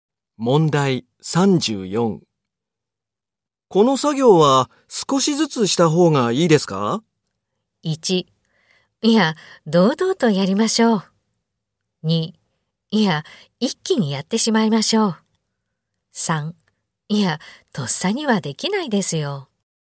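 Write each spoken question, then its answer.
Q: この作業は少しずつした方がいいですか?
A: 2: いや、一気にやってしまいましょう。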